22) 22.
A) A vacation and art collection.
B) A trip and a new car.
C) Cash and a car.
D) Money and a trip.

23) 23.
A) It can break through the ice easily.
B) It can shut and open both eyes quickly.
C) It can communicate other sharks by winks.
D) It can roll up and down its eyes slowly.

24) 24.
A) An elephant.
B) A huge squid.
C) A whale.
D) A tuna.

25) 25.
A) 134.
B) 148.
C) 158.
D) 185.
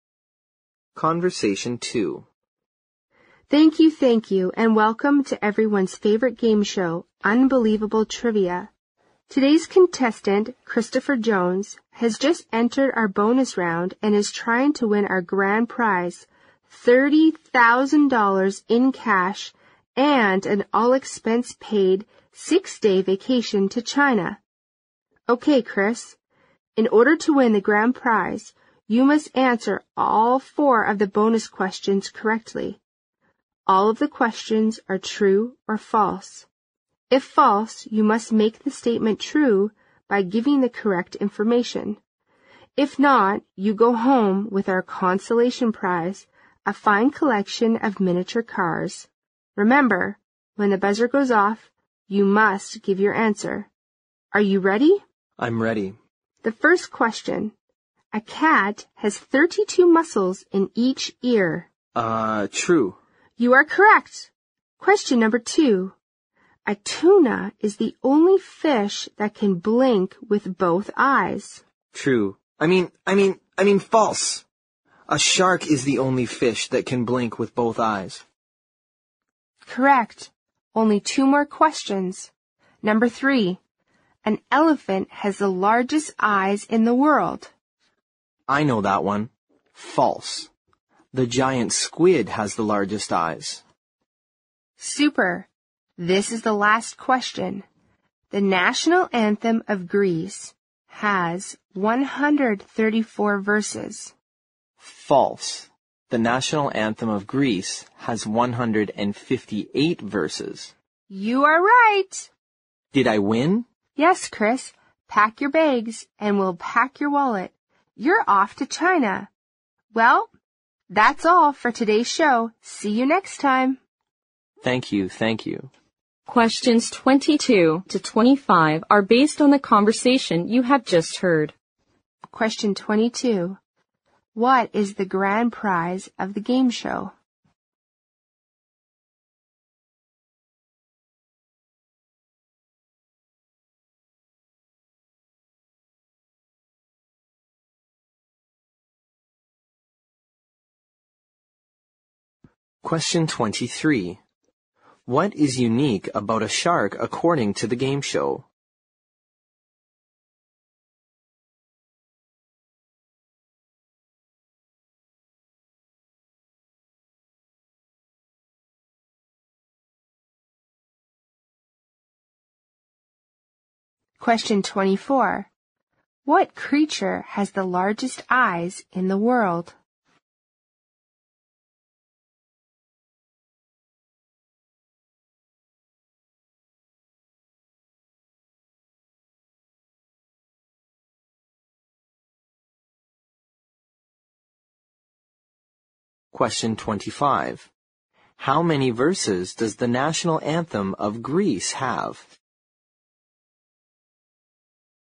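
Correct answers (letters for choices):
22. D
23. B
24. B
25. C

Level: 六级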